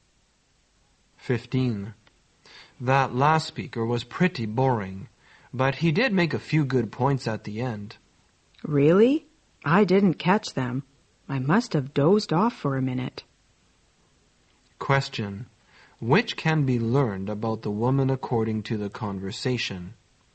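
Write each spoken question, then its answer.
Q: Which can be learned about the woman according to the conversation?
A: She fell asleep and missed the speaker's good points.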